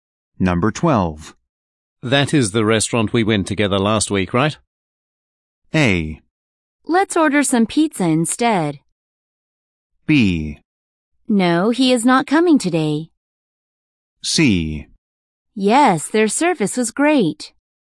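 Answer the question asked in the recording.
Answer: C: Yes, their service was great.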